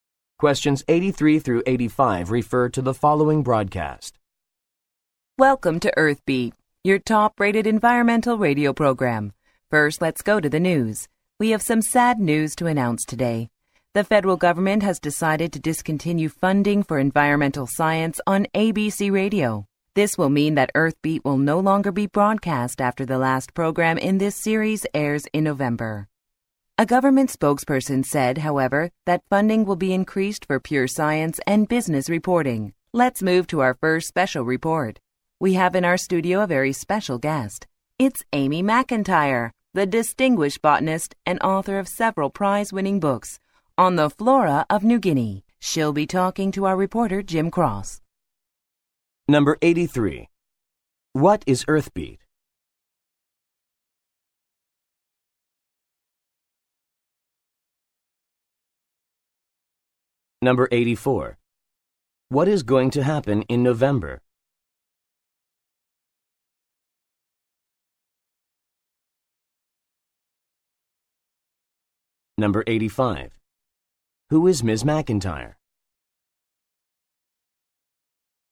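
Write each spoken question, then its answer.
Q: What is Earthbeat?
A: An environmental radio program

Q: What is going to happen in November?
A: The last program of Earthbeat will be broadcast

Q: Who is Ms. McIntyre?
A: A botanist and author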